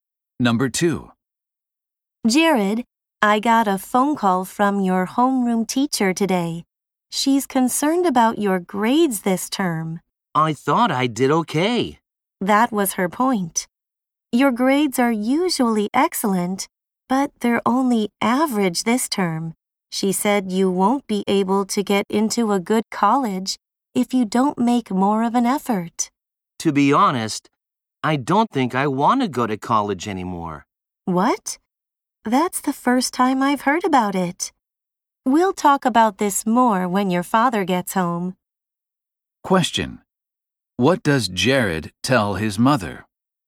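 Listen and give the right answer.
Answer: He no longer wants to go to college.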